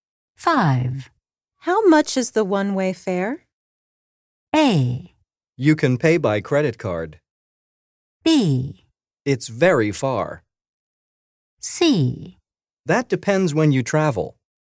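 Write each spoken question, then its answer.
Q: How much is the one-way fare?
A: C: That depends when you travel.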